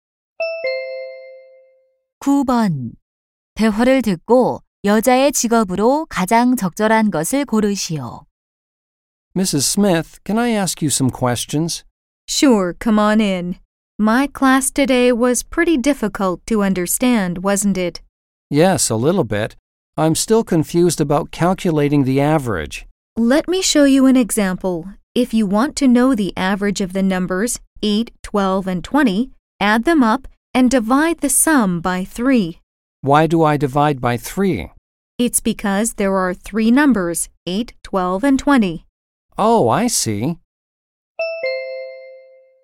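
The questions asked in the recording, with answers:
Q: 대화를 듣고 여자의 직업으로 가장 적절한 것을 고르시오.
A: 교사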